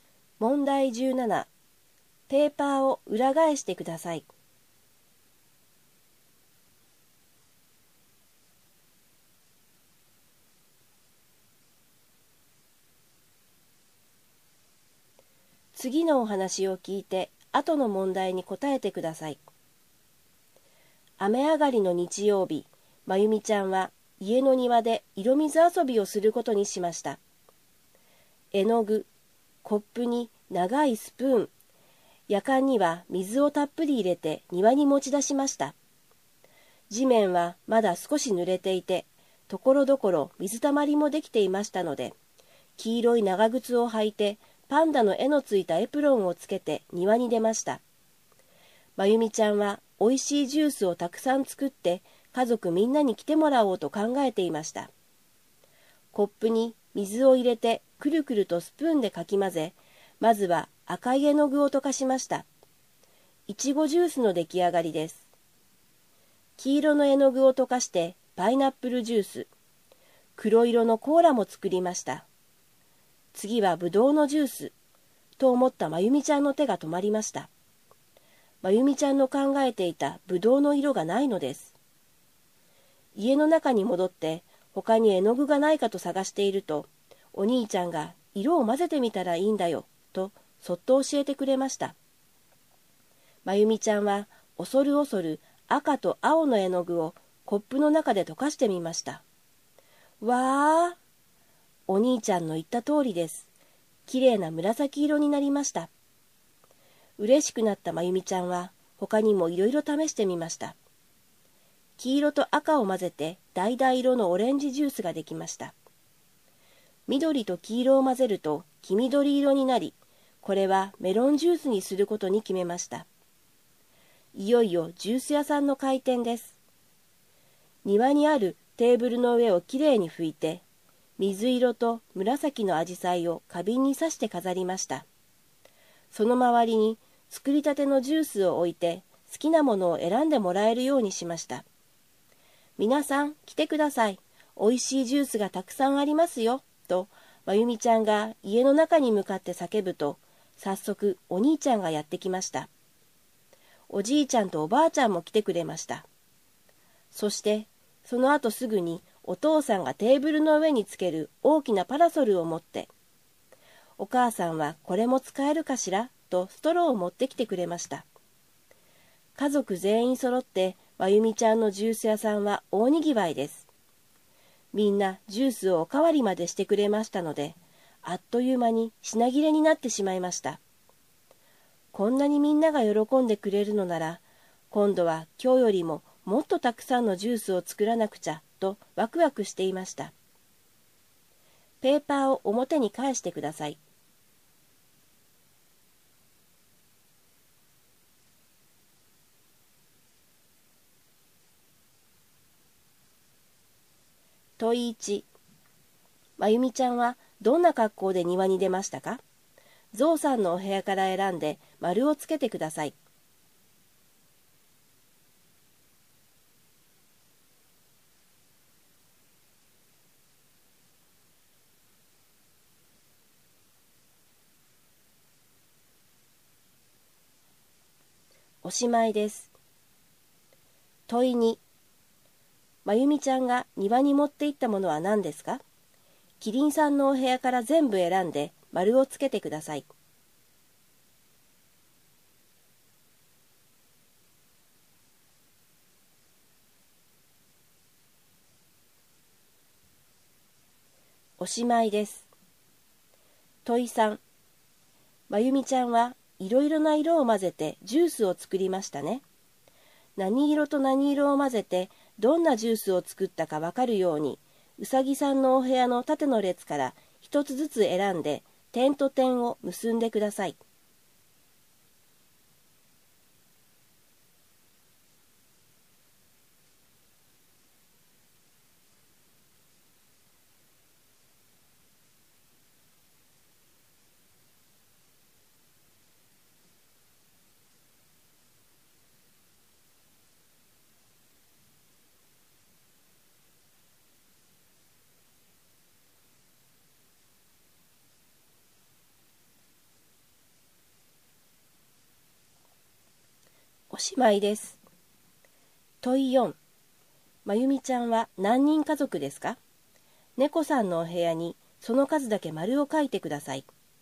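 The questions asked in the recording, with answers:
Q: 真由美ちゃんはどんな格好で庭に出ましたか?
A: 黄色い長靴を履いて、パンダの絵のついたエプロンをつけた格好

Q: 真由美ちゃんが庭に持って行ったものは何ですか?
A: 絵の具、コップ、長いスプーン、水を入れたやかん

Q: まゆみちゃんは何人家族ですか?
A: 6人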